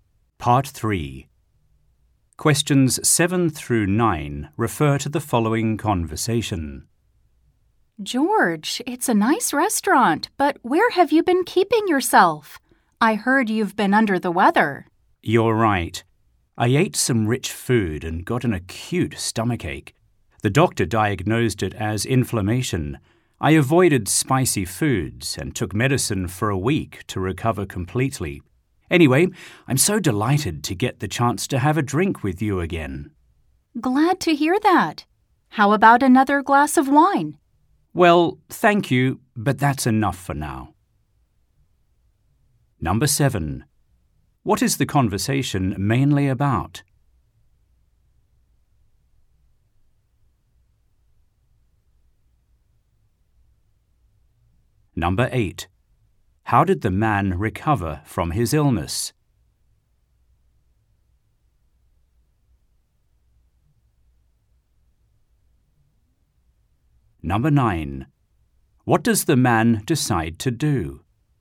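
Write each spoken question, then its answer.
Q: How did the man recover from his illness?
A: He avoided spicy foods and took medicine for a week.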